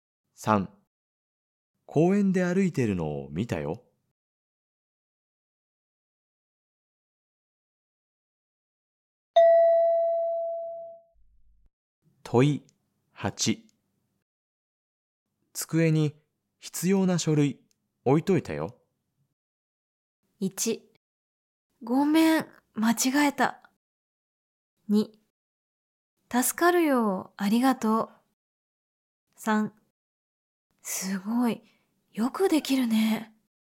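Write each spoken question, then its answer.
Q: 机に必要な書類置いといたよ。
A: 2: 助かるよ、ありがとう。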